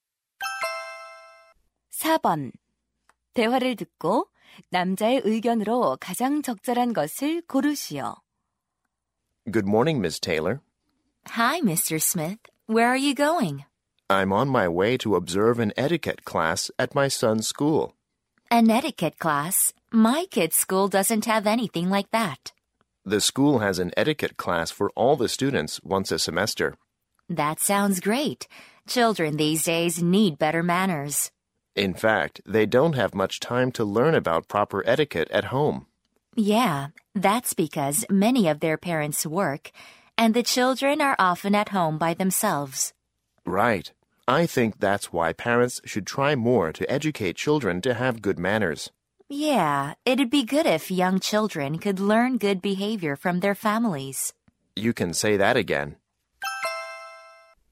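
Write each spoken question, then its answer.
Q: 대화를 듣고 남자의 의견으로 가장 적절한 것을 고르시오.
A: 부모가 자녀의 예절 교육에 더 힘써야 한다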